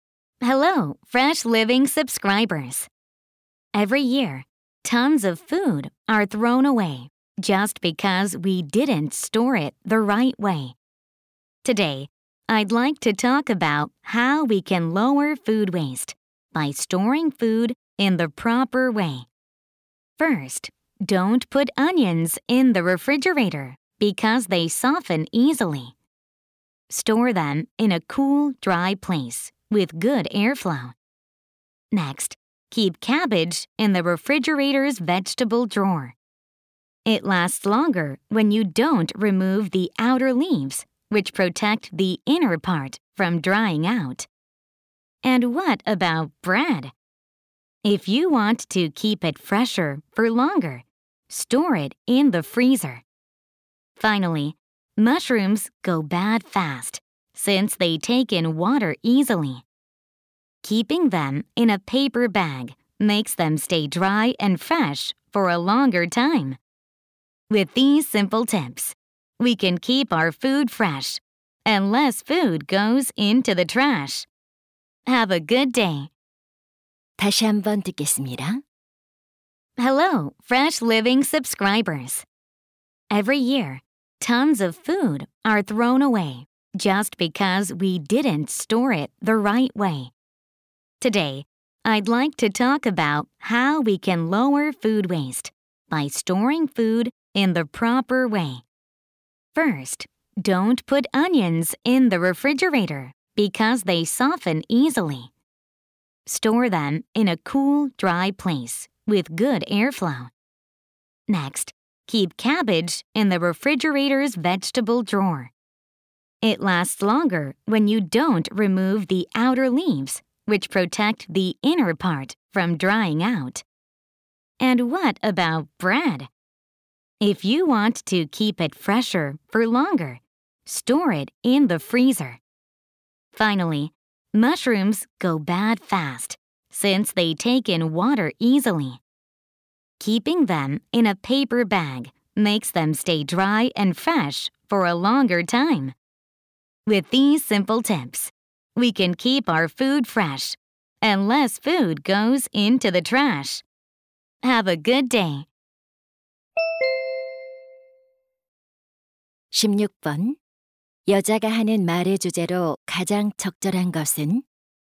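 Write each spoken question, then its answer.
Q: 여자가 하는 말의 주제로 가장 적절한 것은?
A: 음식물 쓰레기를 줄이기 위한 올바른 음식 보관 방법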